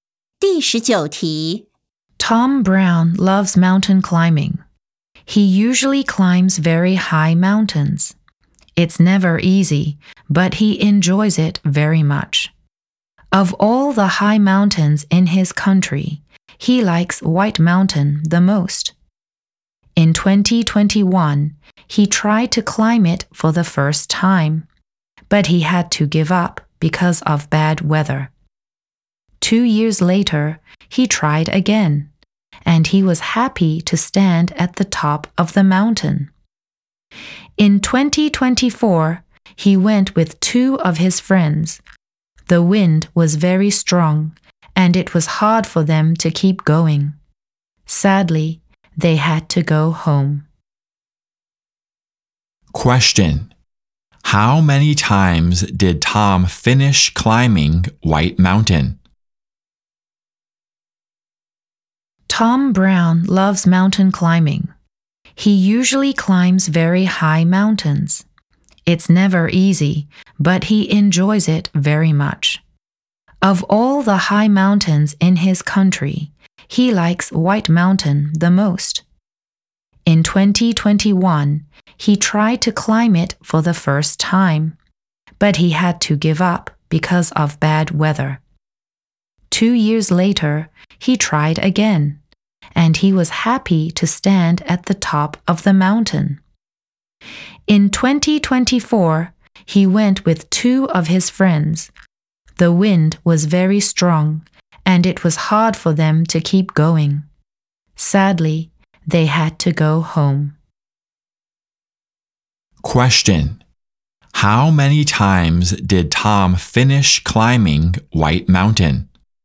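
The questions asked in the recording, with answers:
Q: How many times did Tom finish climbing White Mountain?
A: Once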